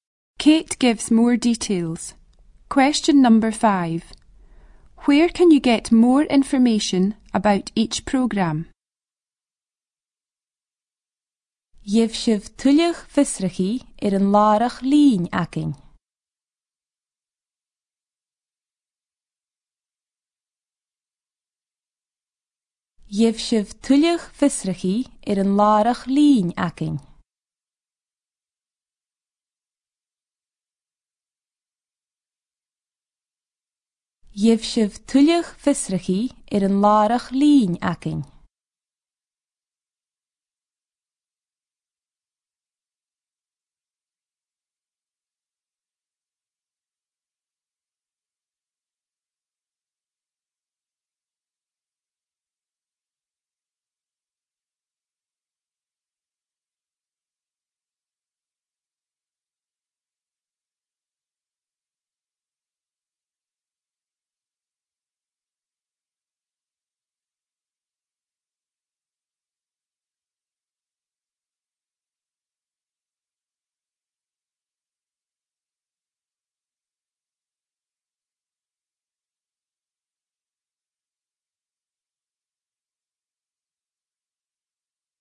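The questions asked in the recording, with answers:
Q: Where can you get more information about each program?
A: On their website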